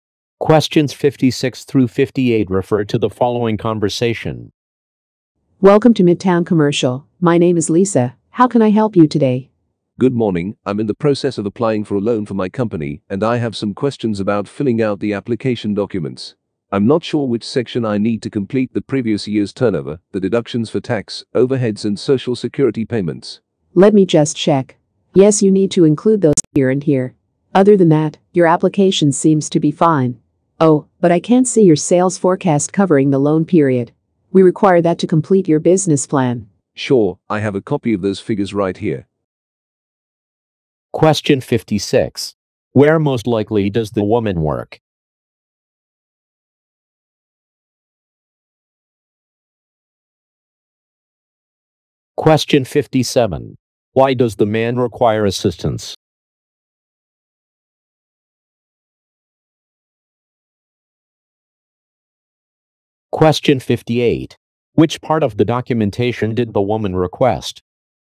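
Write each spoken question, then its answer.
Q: Where most likely does the woman work?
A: At a bank

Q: Why does the man require assistance?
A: He is unsure how to fill out the loan application

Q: Which part of the documentation did the woman request?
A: The sales forecast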